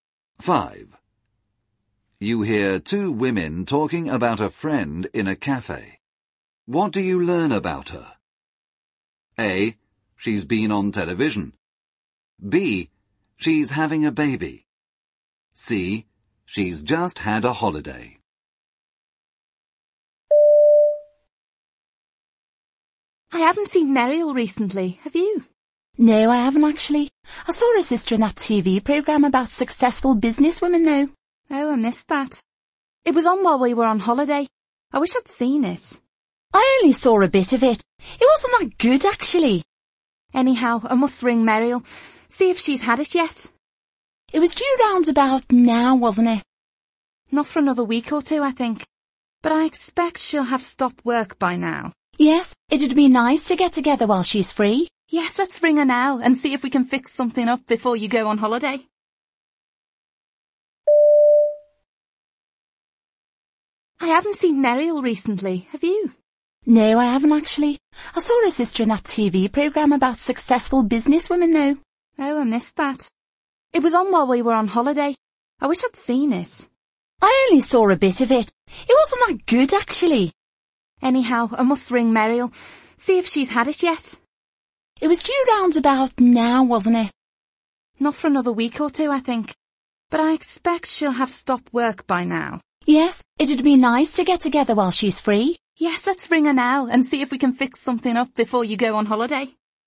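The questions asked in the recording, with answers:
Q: What do you learn about her?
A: B: She's having a baby.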